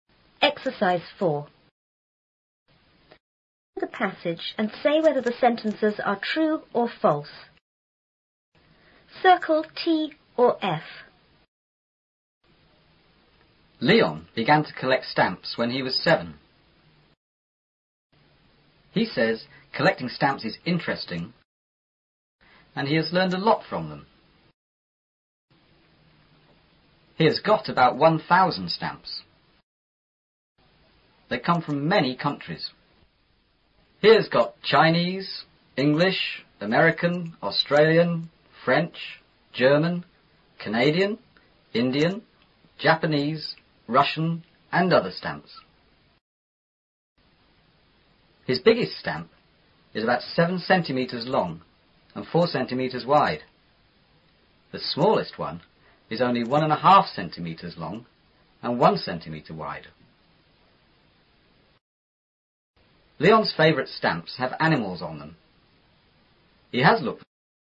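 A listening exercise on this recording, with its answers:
Circle T or F.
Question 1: Leon began to collect stamps when he was twenty.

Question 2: He says he collect stamps is interesting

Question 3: He has about 100 stamps.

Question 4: He has stamps from more than seven countries.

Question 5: His biggest stamp is bigger than this book.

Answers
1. F
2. T
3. F
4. T
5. F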